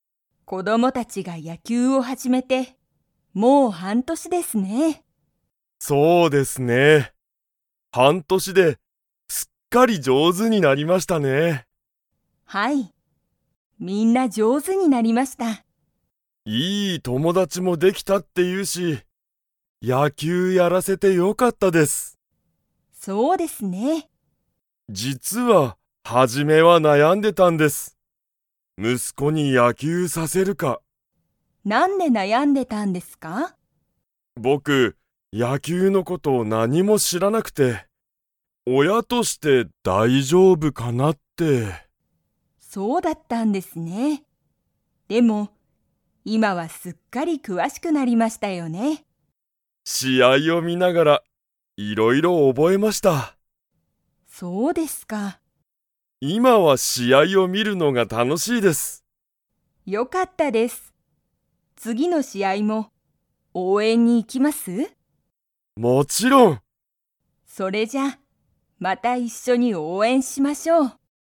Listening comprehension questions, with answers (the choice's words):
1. 子供こども達たちが野球やきゅうを始はじめて、もう だ。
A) 一週間いっしゅうかん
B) 三週間さんしゅうかん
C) 半年はんとし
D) 一年いちねん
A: 半年はんとし

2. 石井いしいさんは、初はじめから野球やきゅうの事ことをよく知しっていましたか?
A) はい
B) いいえ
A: いいえ

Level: Level 4